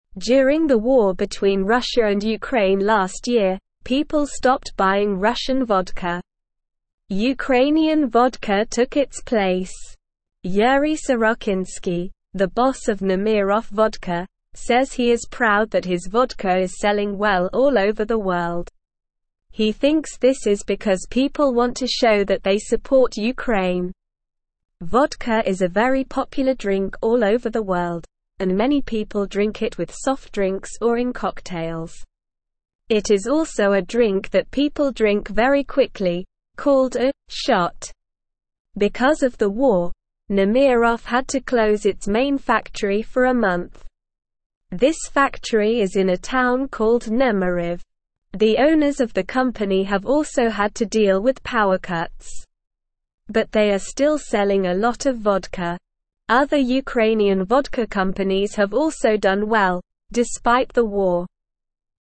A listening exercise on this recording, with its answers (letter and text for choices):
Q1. What did people stop buying during the war?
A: People stopped buying Russian vodka.

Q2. What did people start buying instead of Russian vodka?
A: People started buying Ukrainian vodka instead.

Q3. Who is Yuriy Sorochynskiy and what does he do?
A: Yuriy Sorochynskiy is the boss of Nemiroff vodka company.

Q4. Why is Yuriy Sorochynskiy proud?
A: Yuriy Sorochynskiy is proud because his vodka is selling well all over the world.

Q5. What is a "shot" of vodka?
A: A "shot" of vodka is when people drink vodka very quickly.

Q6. It is also a drink that people drink very quickly, called a "(5)________".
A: Shot

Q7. What type of alcohol is Nemiroff?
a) vodka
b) tequila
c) beer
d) wine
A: a) vodka

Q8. Where is Nemiroff's main factory located?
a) Moscow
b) Kiev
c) Nemyriv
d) St. Petersburg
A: c) Nemyriv

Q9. Why did Nemiroff have to close its main factory for a month?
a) because of war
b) because of a fire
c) because of a flood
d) because of a strike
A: a) because of war

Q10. Why is Yuriy Sorochynskiy proud of his vodka?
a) because it is popular all over the world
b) because it is expensive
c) because it is the only Ukrainian vodka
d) because it is made from special ingredients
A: a) because it is popular all over the world

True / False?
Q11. People stopped buying Ukrainian vodka during the war between Russia and Ukraine.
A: False

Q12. Yuriy Sorochynskiy is happy that Nemiroff vodka is selling well all over the world.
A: True

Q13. Nemiroff had to close its main factory for a month because of the war.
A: True

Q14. Other Ukrainian vodka companies did not do well during the war.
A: False

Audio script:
During the war between Russia and Ukraine last year, people stopped buying Russian vodka. Ukrainian vodka took its place. Yuriy Sorochynskiy, the boss of Nemiroff vodka, says he is proud that his vodka is selling well all over the world. He thinks this is because people want to show that they support Ukraine. Vodka is a very popular drink all over the world, and many people drink it with soft drinks or in cocktails. It is also a drink that people drink very quickly, called a "shot". Because of the war, Nemiroff had to close its main factory for a month. This factory is in a town called Nemyriv. The owners of the company have also had to deal with power cuts. But they are still selling a lot of vodka. Other Ukrainian vodka companies have also done well, despite the war.

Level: Level 1